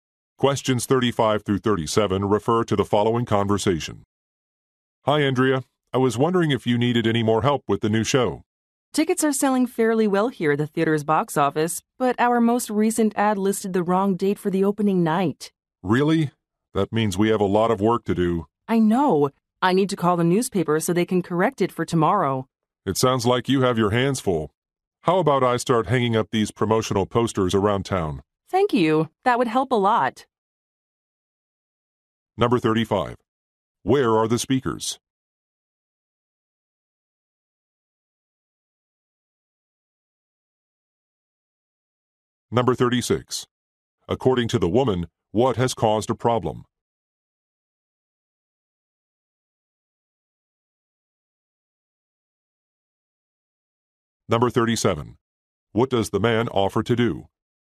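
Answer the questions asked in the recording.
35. At a theater box office
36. An ad listed the wrong opening-night date
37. Hang up promotional posters around town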